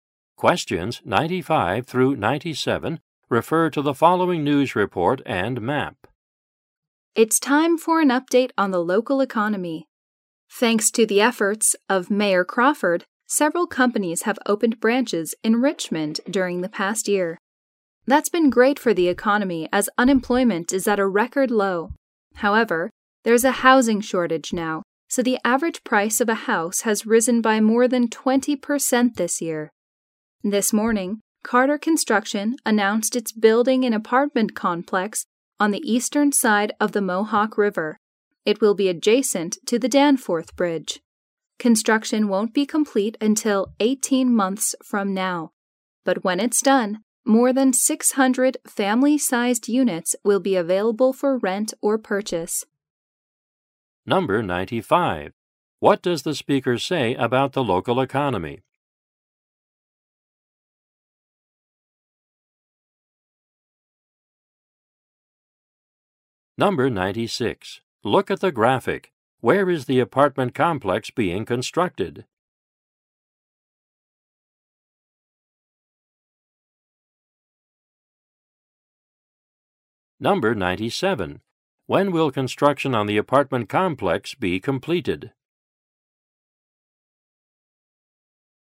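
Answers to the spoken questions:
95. Unemployment is at a record low
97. In 18 months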